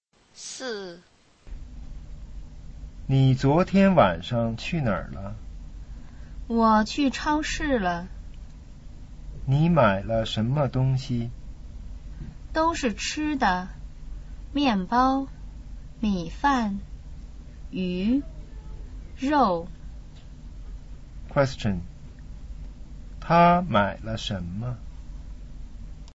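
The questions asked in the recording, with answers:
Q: 他买了什么?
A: 吃的:面包、米饭、鱼、肉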